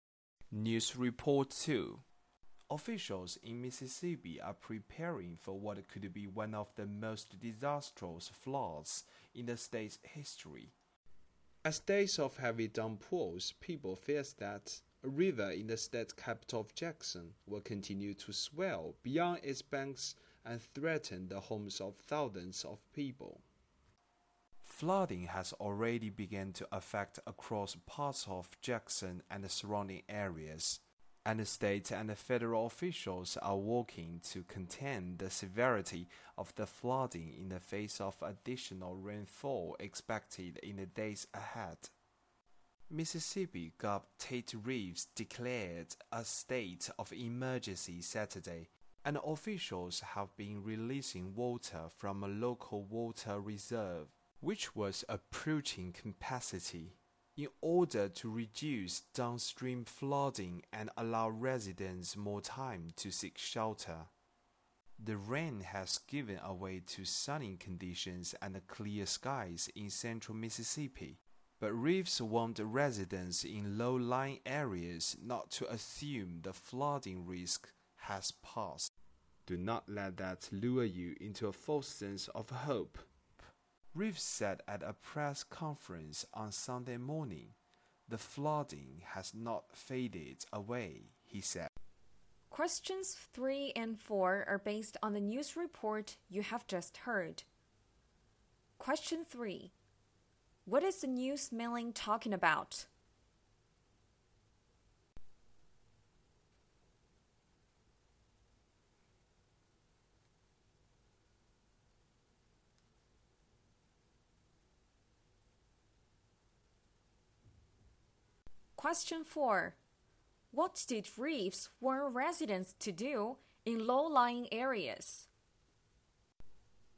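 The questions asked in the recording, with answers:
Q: What is the news milling talking about?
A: A possibly disastrous flood in Mississippi.

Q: What did reefs warn residents to do in low-lying areas?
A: Not to assume the flooding risk has passed.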